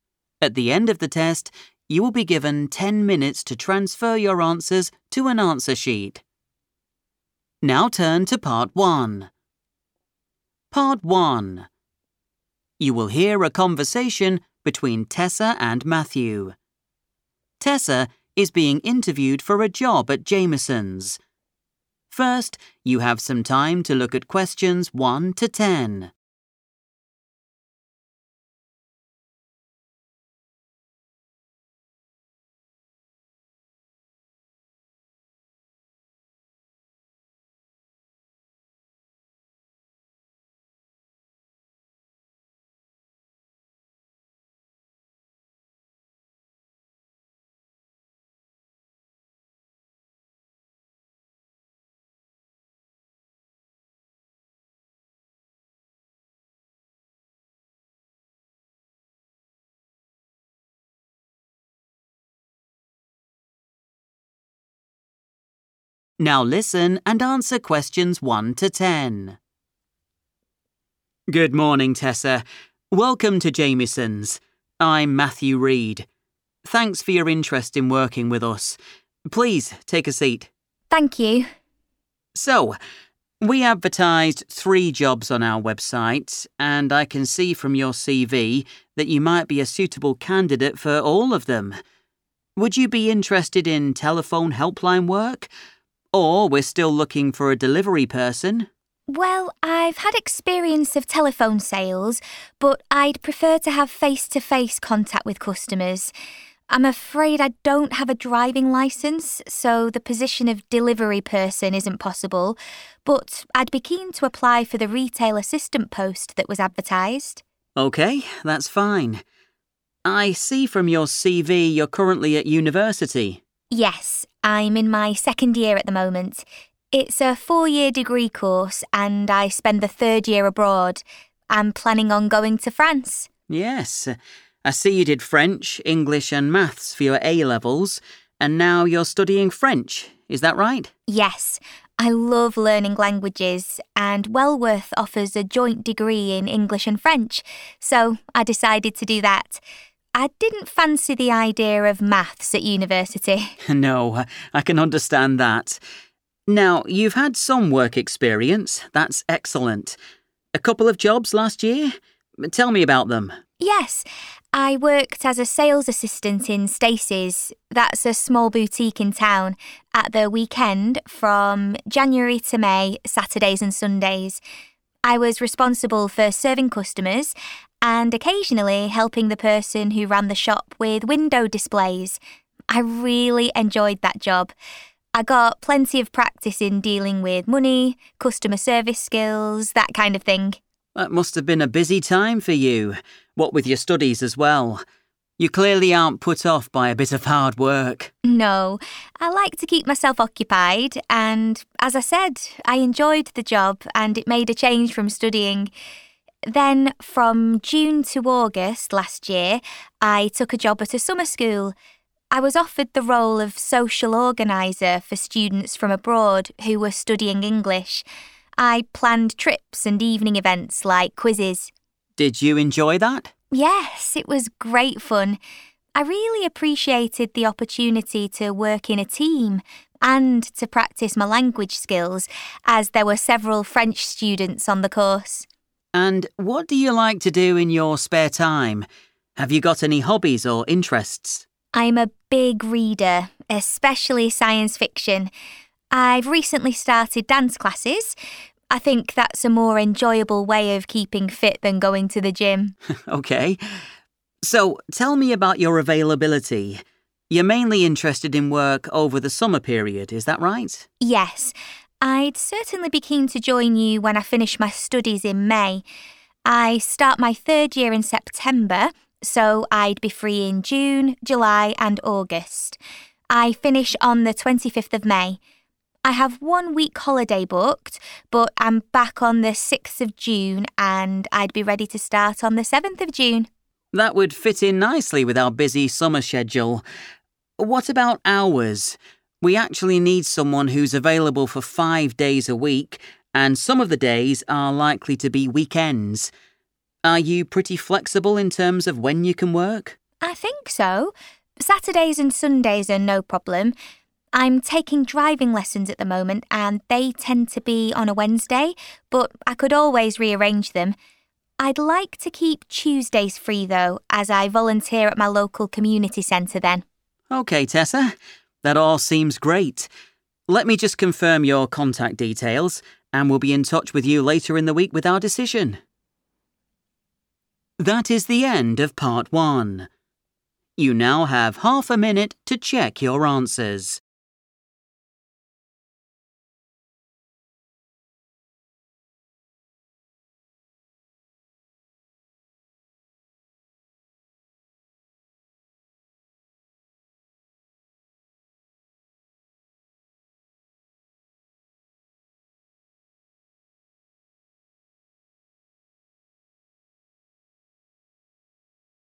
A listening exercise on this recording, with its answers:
Complete the form below. Write NO MORE THAN THREE WORDS AND/OR A NUMBER for each answer.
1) Placement of job advertisement: on the 1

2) Post: 2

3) Degree in 3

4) Role: 4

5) Responsibilities: served customers and assisted the manager to arrange the 5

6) Period: 6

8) Going to 8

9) Possible starting date: 9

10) Unavailable on 10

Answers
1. website
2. retail assistant
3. English and French
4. sales assistant
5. window displays
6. June to August / June-August
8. dance classes
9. 7th June / 7 June / June 7th / June 7 / 7th of June
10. Tuesdays

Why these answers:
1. The correct answer is 'website' because Matthew explains at the beginning of the talk that the company put notices (advertised) for three different jobs on their internet page.
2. The correct answer is derived from the conversation where the interviewer mentions three available jobs. Tessa explains why she cannot do the other two: she wants to work with people in person (not over the phone) and she cannot drive. She explicitly states her interest in the third option, which is the retail assistant position.
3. The correct answer is English and French because Tessa explains that she chose a 'joint degree'—which means a course where you study two subjects together—at Welworth university. While Matthew mentions that she is studying French, Tessa clarifies that her specific degree program includes both English and French.
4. The correct answer is 'sales assistant' because Tessa mentions that this was her job title at Stacey's Boutique during the period from January to May. In this context, 'Role' refers to the position or name of the job she did.
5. The correct answer is correct because the transcript describes Tessa's tasks at Stacey's Boutique. She mentions that besides serving customers, she assisted the manager with the arrangement of items in the store's windows. The term for this activity is 'window displays.'
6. The correct answer is determined by looking at the part of the conversation where Tessa lists her past work. She explains that after her job at the boutique (January to May), she had another job. She states that this second job at a summer school was between the months of June and August. Keywords like 'from' and 'to' indicate a time period.
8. The correct answer is "dance classes" because when the interviewer asks about her hobbies and interests, Tessa mentions that she reads science fiction and has recently begun taking these classes. She explains that she prefers them over going to the gym for staying fit. In the form, this fits perfectly after the words 'Going to'.
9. The correct answer is 7th June / 7 June because the transcript shows Tessa discussing her summer schedule. She explains that after finishing university and taking a one-week holiday, she returns on June 6th. She specifically mentions that she is prepared or "ready to start" her work duties on the following day, which is the 7th of June.
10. The correct answer is "Tuesdays" because Tessa specifically asks to have this day off every week. She explains that she is busy because she "volunteers," which means she helps people for free at a "community centre." Because she already has this plan, she is "unavailable" (not free) to work at Jamieson's on that specific day.

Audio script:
Matthew: Good morning, Tessa. Welcome to Jamieson's. I'm Matthew Reed. Thanks for your interest in working with us. Please take a seat.
Tessa: Thank you.
Matthew: So, we advertised three jobs on our website and I can see from your cv that you might be a suitable candidate for all of them. Would you be interested in telephone helpline work? Or we're still looking for a delivery person.
Tessa: Well, I've had experience of telephone sales but I'd prefer to have face-to-face contact with customers.
I'm afraid I don't have a driving licence so the position of delivery person isn't possible. But I'd be keen to apply for the retail assistant post that was advertised
Matthew: OK, that's fine. I see from your CV you're currently at university.
Tessa: Yes. I'm in my second year at the moment. It's a four-year degree course and I spend the third year abroad. I'm planning on going to France.
Matthew: Yes, I see you did French, English and Maths for your A levels, and now you're studying French. Is that right?
Tessa: Yes. I love learning languages and Welworth offers a joint degree in English and French so I decided to do that. I didn't fancy the idea of Maths at university.
Matthew: No, I can understand that. Now, you've had some work experience. That's excellent. A couple of jobs last year? Tell me about them.
Tessa: Yes, I worked as a sales assistant in Stacey's - that's a small boutique in town - at the weekend from January to May, Saturdays and Sundays. I was responsible for serving customers and occasionally helping the person who ran the shop with window displays. I really enjoyed that job. I got plenty of practice in dealing with money, customer service skills, that kind of thing.
Matthew: That must have been a busy time for you, what with your studies as well. You clearly aren't put off by a bit of hard work!
Tessa: No, I like to keep myself occupied and, as I said, I enjoyed the job and it made a change from studying.
Then from June to August last year, I took a job at a summer school. I was offered the role of social organiser for students from abroad who were studying English. I planned trips and evening events like quizzes.
Matthew: Did you enjoy that?
Tessa: Yes, it was great fun. I really appreciated the opportunity to work in a team and to practise my language skills as there were several French students on the course.
Matthew: And what do you like to do in your spare time? Have you got any hobbies or interests?
Tessa: I'm a big reader, especially science fiction. I've recently started dance classes – I think that's a more enjoyable way of keeping fit than going to the gym.
Matthew: OK. So, tell me about your availability. You're mainly interested in work over the summer period, is that right?
Tessa: Yes. I'd certainly be keen to join you when I finish my studies in May. I start my third year in September so I'd be free in June, July and August. I finish on the 25th of May. I have one week holiday booked but I'm back on the 6th of June and I'd be ready to start on the 7th of June.
Matthew: That would fit in nicely with our busy summer schedule. What about hours? We actually need someone who's available for five days a week and some of the days are likely to be weekends. Are you pretty flexible in terms of when you can work?
Tessa: I think so. Saturdays and Sundays are no problem. I'm taking driving lessons at the moment and they tend to be on a Wednesday but I could always re-arrange them. I'd like to keep Tuesdays free, though, as I volunteer at my local community centre then.
Matthew: OK, Tessa. That all seems great. Let me just confirm your contact details and we'll be in touch with you later in the week with our decision.